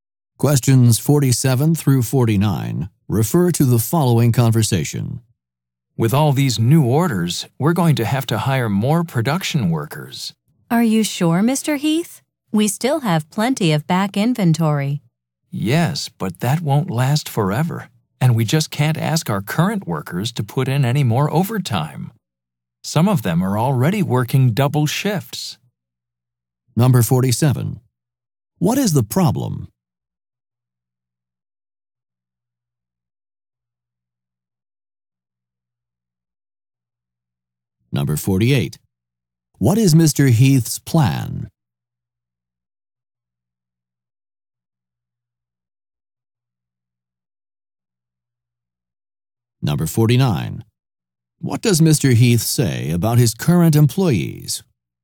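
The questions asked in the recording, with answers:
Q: What is the problem?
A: There are too many new orders for the current workers

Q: What is Mr. Heath's plan?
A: To hire more production workers

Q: What does Mr. Heath say about his current employees?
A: They can't work any more overtime; some already work double shifts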